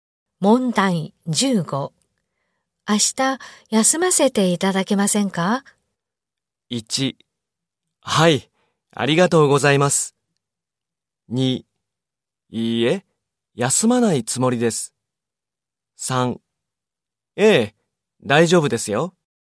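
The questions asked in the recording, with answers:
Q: 明日、休ませていただけませんか?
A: 3: ええ、大丈夫ですよ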